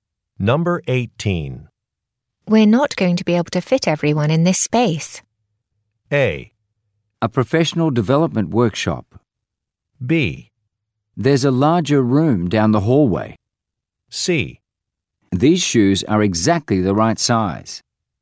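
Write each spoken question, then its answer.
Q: We're not going to be able to fit everyone in this space.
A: B: There's a larger room down the hallway.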